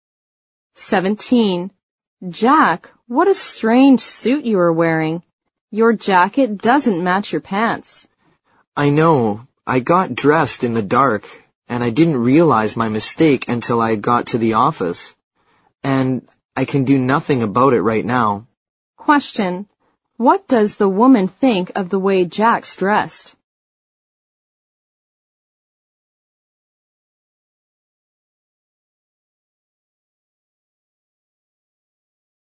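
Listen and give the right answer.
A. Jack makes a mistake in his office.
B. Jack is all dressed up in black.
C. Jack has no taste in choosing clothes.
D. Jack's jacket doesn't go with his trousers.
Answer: D. Jack's jacket doesn't go with his trousers.

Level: 六级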